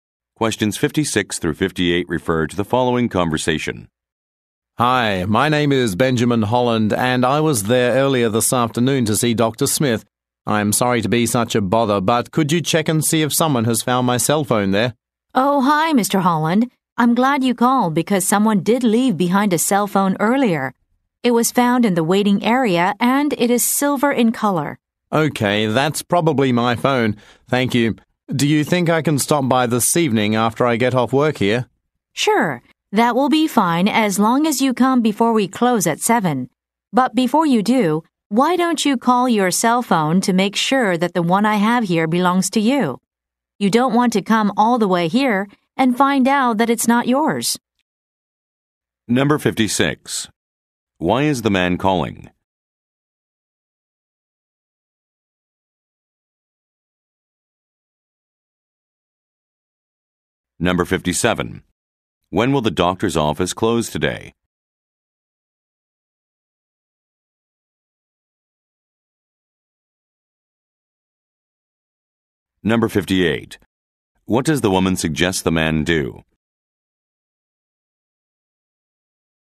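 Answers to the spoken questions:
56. To ask if his lost cell phone was found
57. At 7
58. Call his cell phone to make sure it is his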